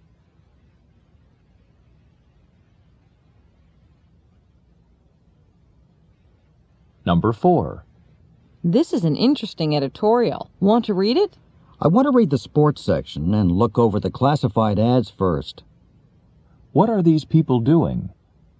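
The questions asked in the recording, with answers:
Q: What are these people doing?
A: Reading a newspaper.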